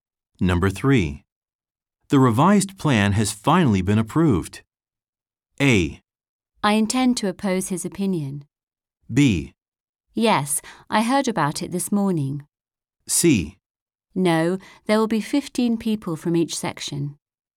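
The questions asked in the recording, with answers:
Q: The revised plan has finally been approved.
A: B: Yes, I heard about it this morning.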